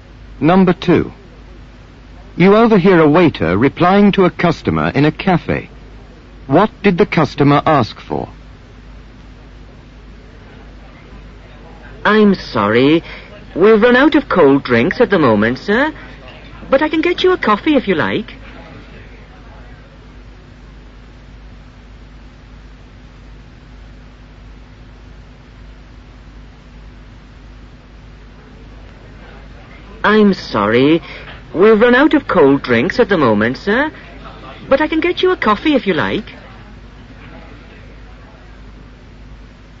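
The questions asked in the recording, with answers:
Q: What did the customer ask for?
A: A cold drink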